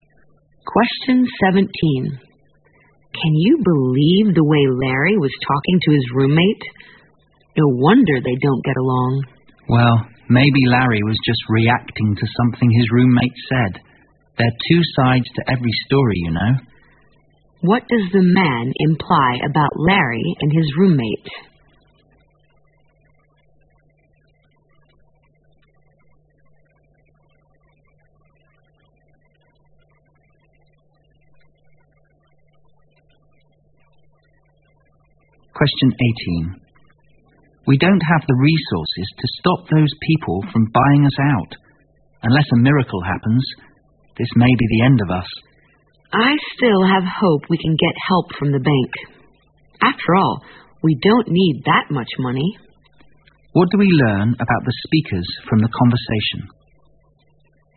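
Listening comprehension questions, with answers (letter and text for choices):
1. What does the man imply about Larry and his roommate?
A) They are both to blame.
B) They are both easy to please.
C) They can manage to get along.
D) They will make peace in time.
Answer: A) They are both to blame.

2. What do we learn about the speakers from the conversation?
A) They are in desperate need of financial assistance.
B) They hope to do miracles with limited resources.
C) They want to borrow a huge sum from the bank.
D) They plan to buy out their business partners.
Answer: A) They are in desperate need of financial assistance.

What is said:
W: Can you believe the way Larry was talking to his roommate? No wonder they don't get along.
M: Well, maybe Larry was just reacting to something his roommate said. There are two sides to every story you know.
Q: What does the man imply about Larry and his roommate?
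M: We don't have the resources to stop those people from buying us out unless a miracle happens. This may be the end of us.
W: I still have hope we can get help from the bank. After all we don't need that much money.
Q: What do we learn about the speakers from the conversation?

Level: 六级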